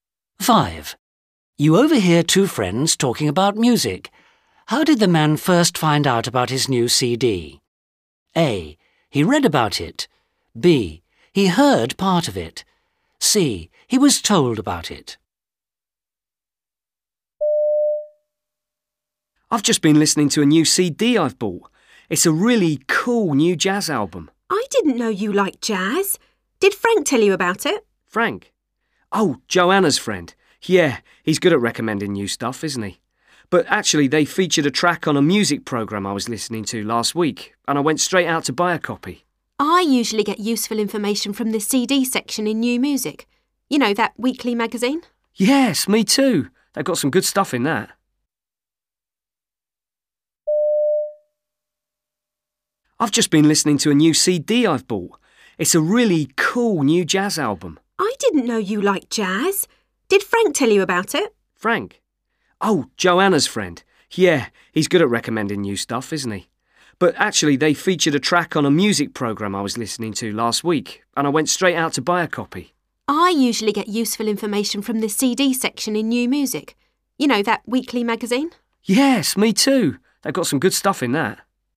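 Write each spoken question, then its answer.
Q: How did the man first find out about his new CD?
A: B: He heard part of it.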